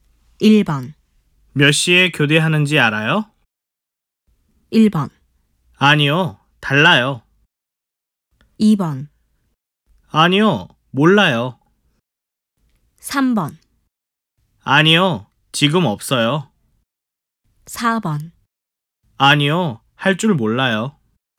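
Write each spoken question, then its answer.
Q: 몇 시에 교대하는지 알아요?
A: 2: 아니요, 몰라요.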